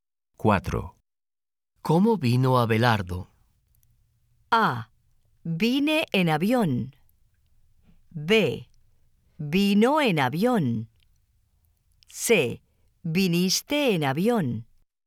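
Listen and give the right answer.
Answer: B: Vino en avión.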